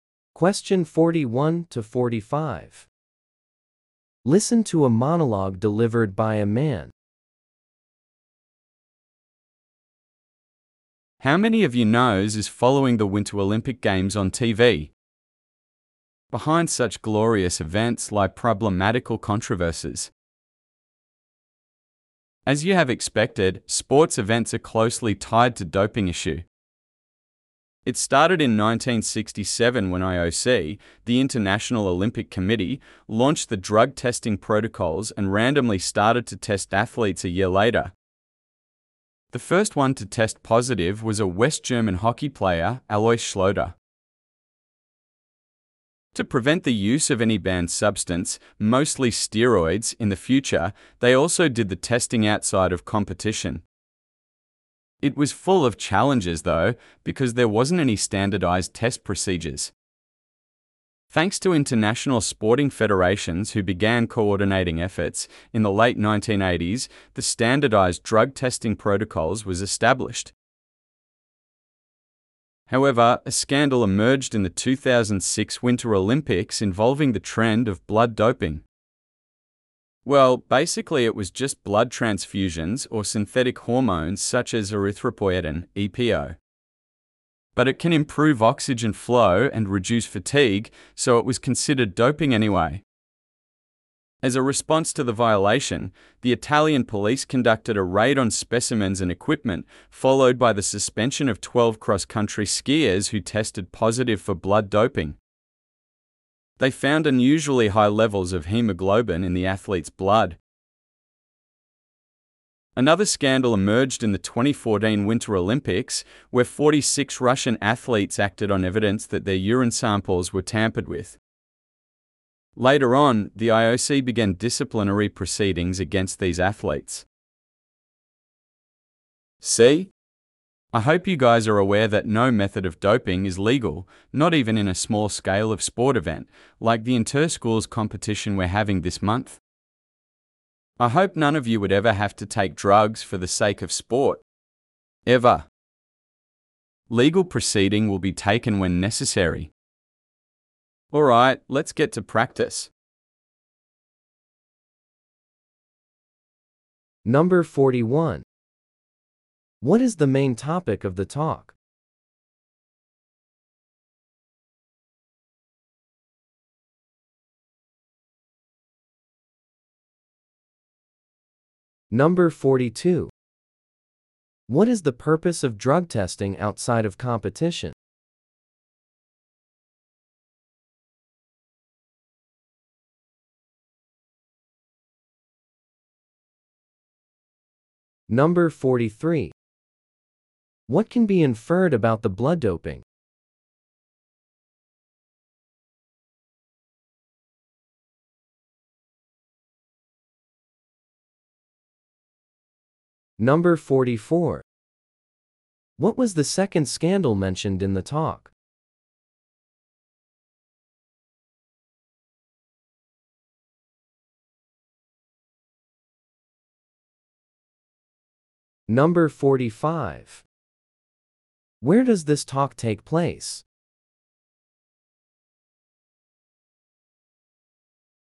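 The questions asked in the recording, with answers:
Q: What is the main topic of the talk?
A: Doping scandals at the Winter Olympics.

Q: What is the purpose of drug testing outside of competition?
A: To prevent the future use of banned substances, mostly steroids.

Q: What was the second scandal mentioned in the talk?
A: In 2014, the urine samples of Russian athletes were tampered with.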